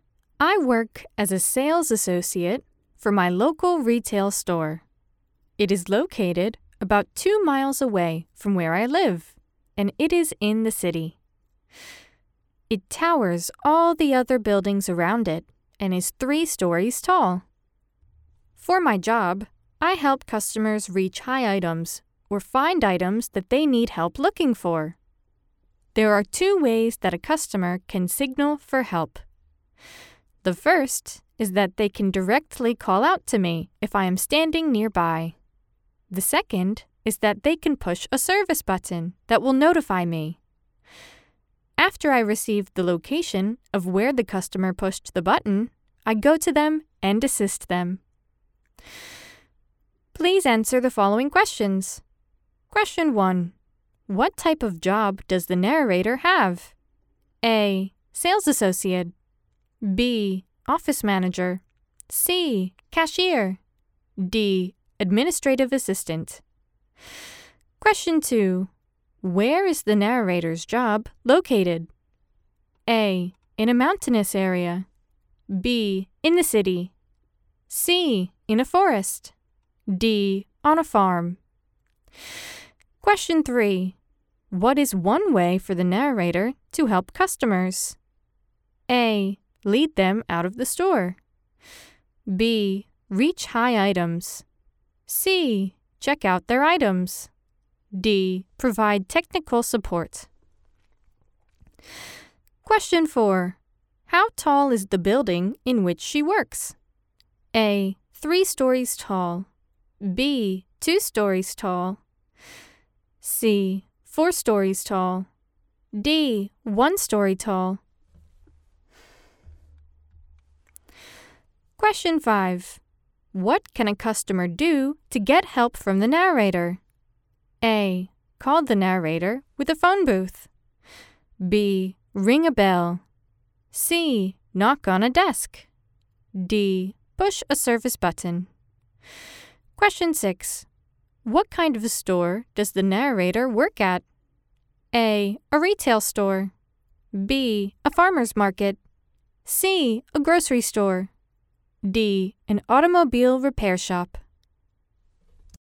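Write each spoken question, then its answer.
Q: What type of job does the narrator have?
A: A: Sales associate.

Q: Where is the narrator's job located?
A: B: In the city.

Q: What is one way for the narrator to help customers?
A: B: Reach high items.

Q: How tall is the building in which she works?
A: A: 3 stories tall.

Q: What can a customer do to get help from the narrator?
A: D: Push a service button.

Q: What kind of a store does the narrator work at?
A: A: A retail store.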